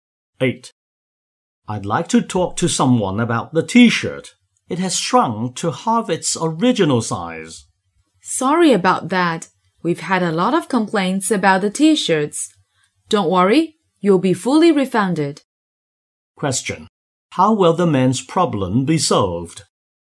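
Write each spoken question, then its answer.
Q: How will the man's problem be solved?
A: He will get a full refund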